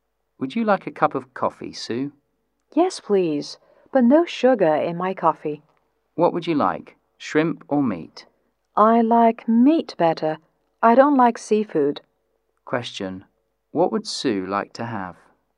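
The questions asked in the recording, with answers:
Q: What would Sue like to have?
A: Coffee without sugar and meat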